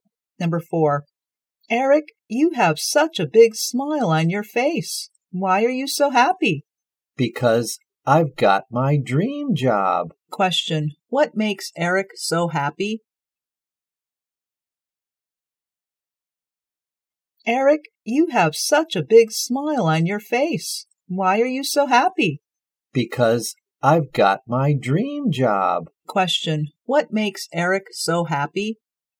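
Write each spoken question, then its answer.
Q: what makes Eric so happy?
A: He got his dream job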